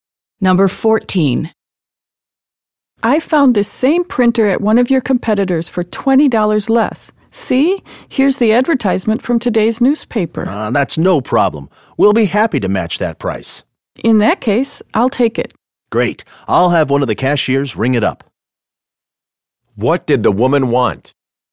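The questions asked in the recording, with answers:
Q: What did the woman want?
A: A price match on the printer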